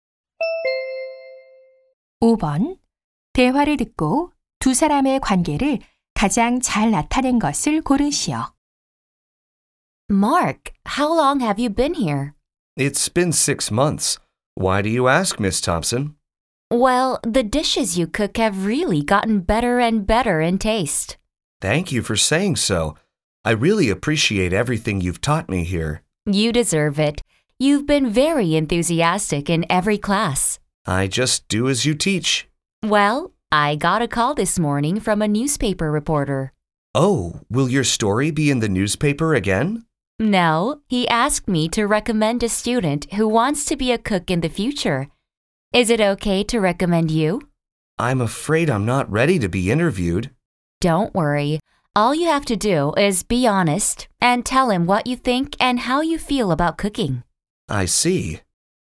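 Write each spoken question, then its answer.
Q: 대화를 듣고 두 사람의 관계를 가장 잘 나타낸 것을 고르시오.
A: 요리 강사 - 수강생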